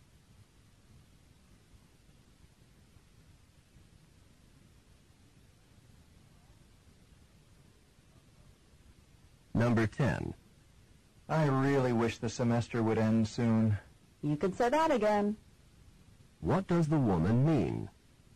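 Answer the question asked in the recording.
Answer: She agrees; she also wants the semester to end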